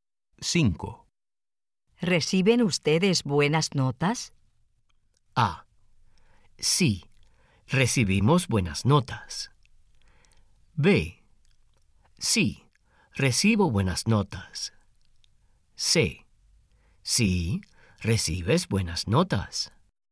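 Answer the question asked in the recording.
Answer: A: Sí, recibimos buenas notas.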